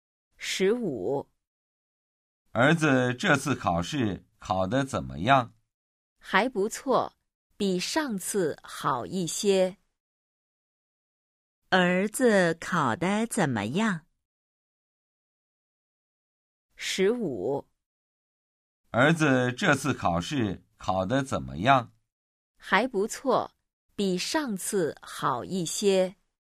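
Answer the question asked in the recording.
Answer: 还不错,比上次好一些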